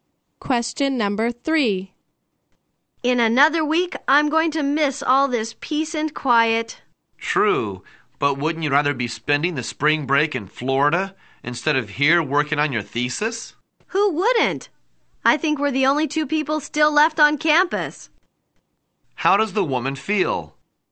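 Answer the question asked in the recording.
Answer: She would rather be in Florida on spring break than working on her thesis.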